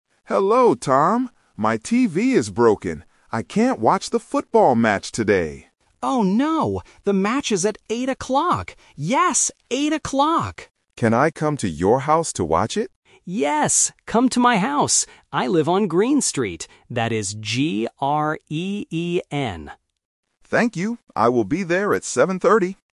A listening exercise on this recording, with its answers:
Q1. What is broken?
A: The TV

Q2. What time is the football match?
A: Eight o'clock

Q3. What is the name of the street?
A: Green